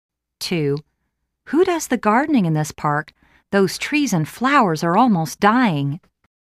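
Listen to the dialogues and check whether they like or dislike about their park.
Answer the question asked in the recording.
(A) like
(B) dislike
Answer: (B) dislike

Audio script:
2.Who does the gardening in this park? Those trees and flowers are almost dyingl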